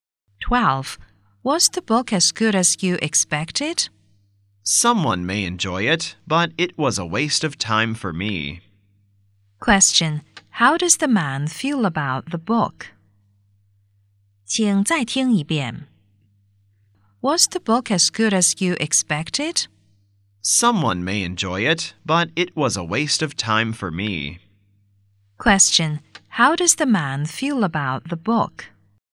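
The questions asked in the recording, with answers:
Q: How does the man feel about the book?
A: It was a waste of time; he didn't like it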